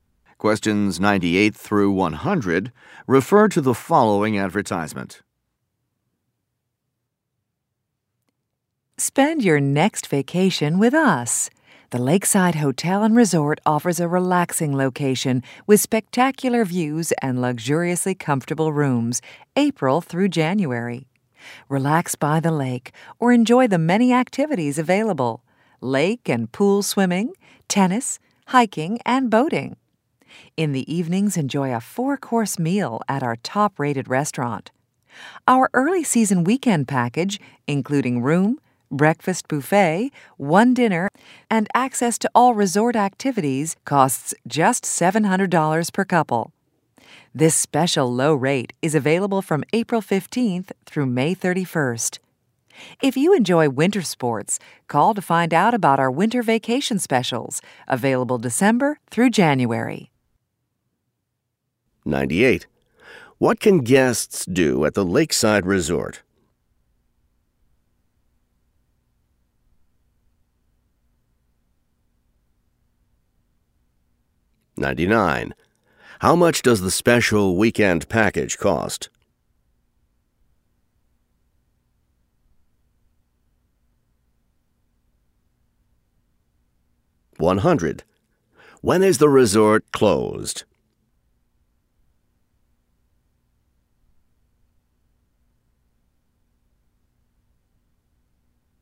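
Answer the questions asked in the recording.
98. Swimming, tennis, hiking, and boating
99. $700 per couple
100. February and March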